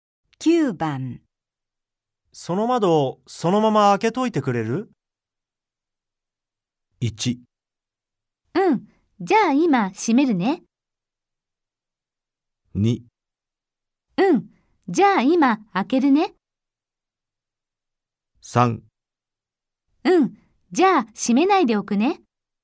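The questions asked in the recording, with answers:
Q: その窓をそのまま開けといてくれる?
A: 3: うん、じゃあ閉めないでおくね。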